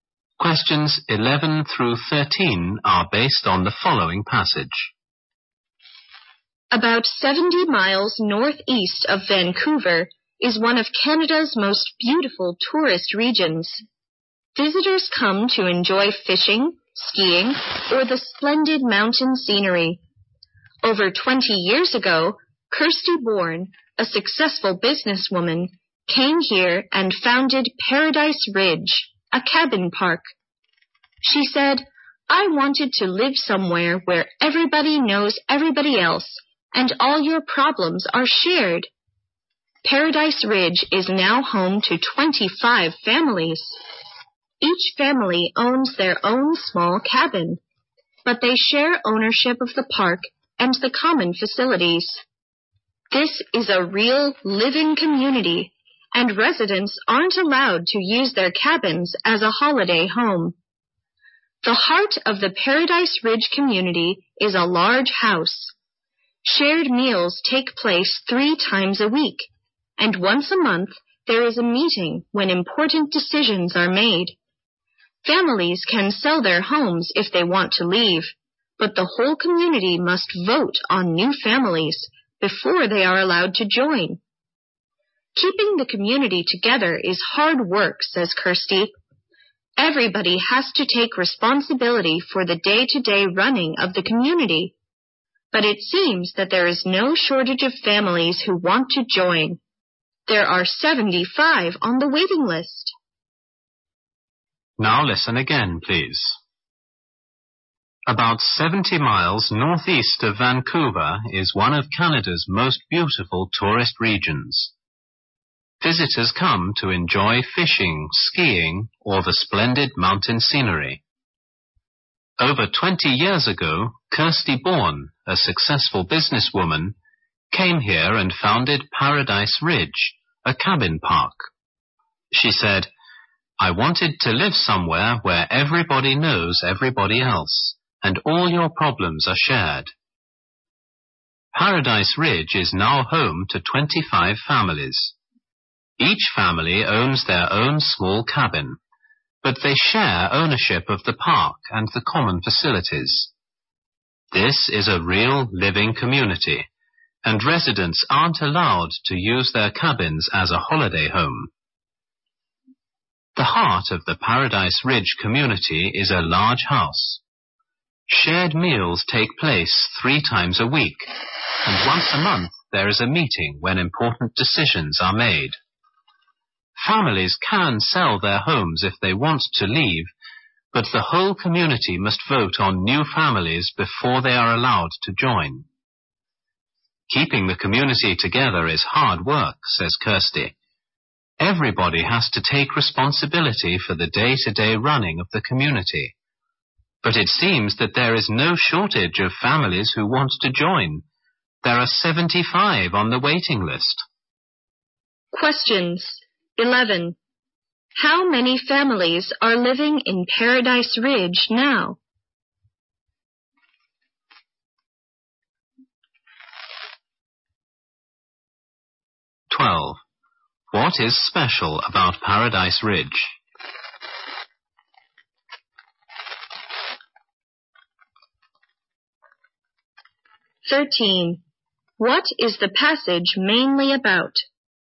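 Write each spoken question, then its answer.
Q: How many families are living in Paradise Ridge now?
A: 25

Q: What is the passage mainly about?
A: The Paradise Ridge community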